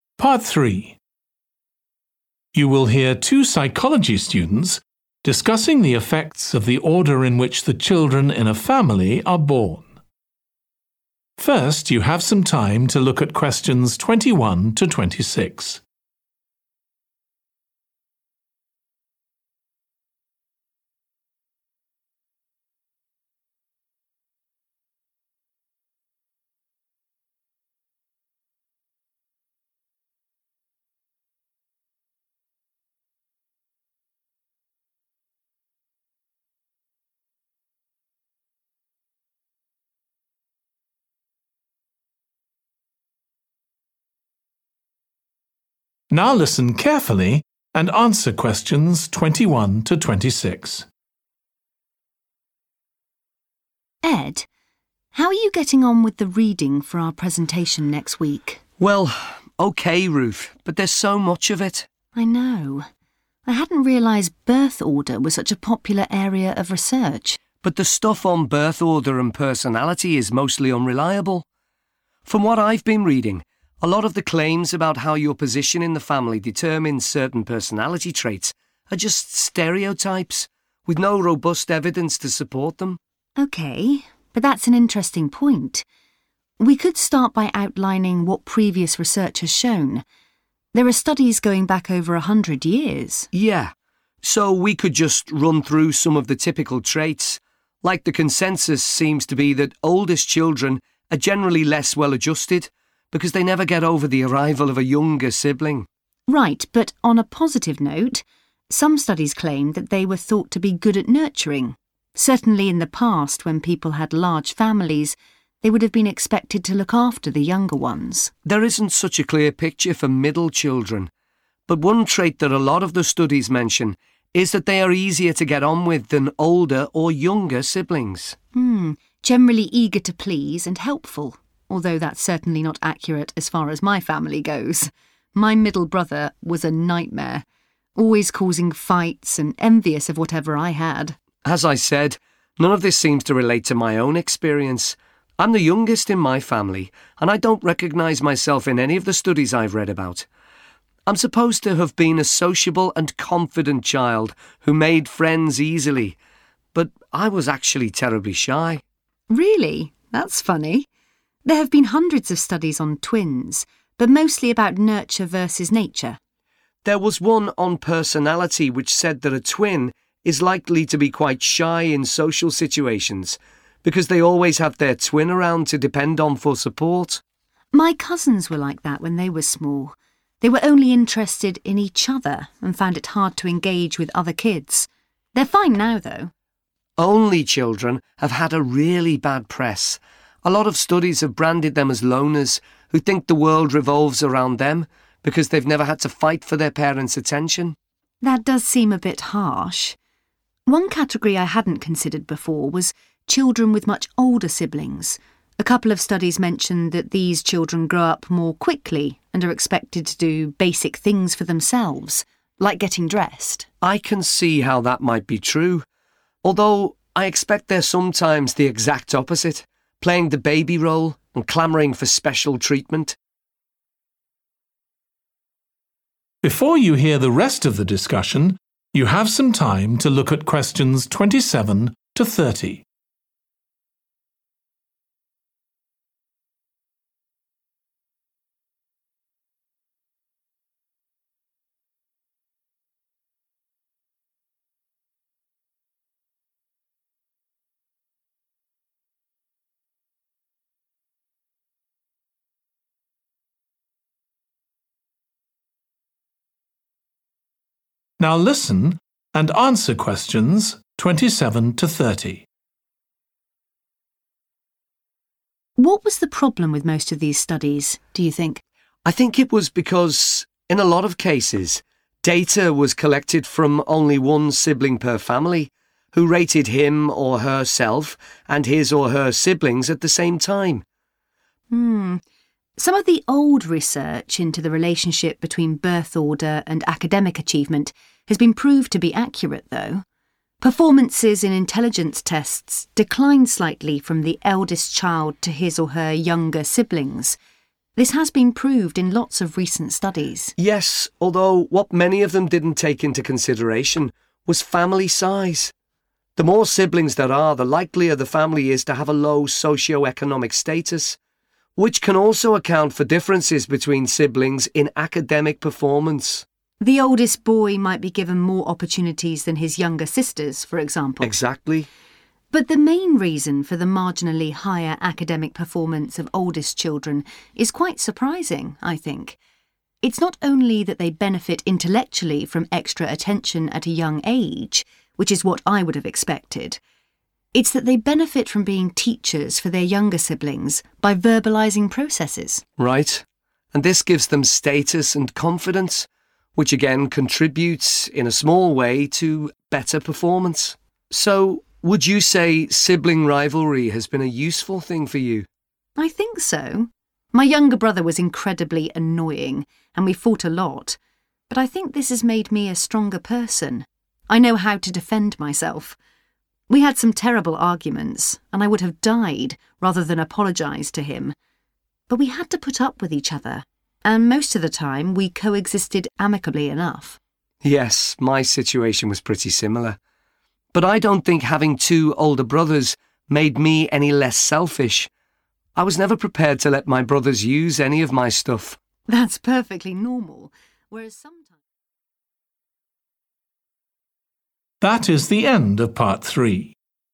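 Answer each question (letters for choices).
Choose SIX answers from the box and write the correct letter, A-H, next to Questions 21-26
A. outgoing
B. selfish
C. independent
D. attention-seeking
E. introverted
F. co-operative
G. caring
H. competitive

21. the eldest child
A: G

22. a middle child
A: F

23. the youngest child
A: A

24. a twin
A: E

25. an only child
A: B

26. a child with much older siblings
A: C

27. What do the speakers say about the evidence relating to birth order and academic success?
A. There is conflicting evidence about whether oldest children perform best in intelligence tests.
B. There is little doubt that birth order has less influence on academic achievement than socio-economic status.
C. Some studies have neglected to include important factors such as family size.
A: C

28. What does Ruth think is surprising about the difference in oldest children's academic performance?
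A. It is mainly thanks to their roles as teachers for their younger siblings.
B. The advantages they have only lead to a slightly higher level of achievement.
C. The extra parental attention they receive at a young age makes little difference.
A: A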